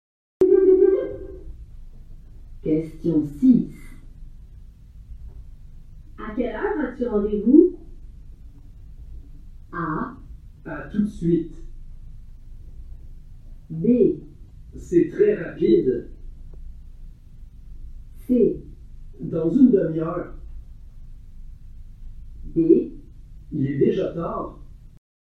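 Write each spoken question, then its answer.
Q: À quelle heure as-tu rendez-vous?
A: C: Dans une demi-heure.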